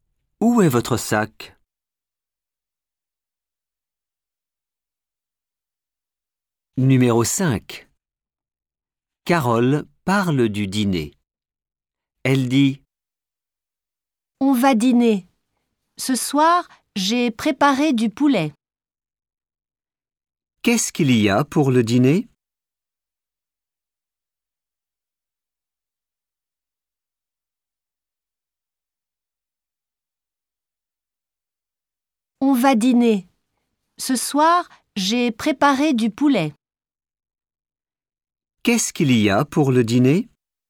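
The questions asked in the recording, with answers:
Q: « Qu'est-ce qu'il y a pour le dîner ? »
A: du poulet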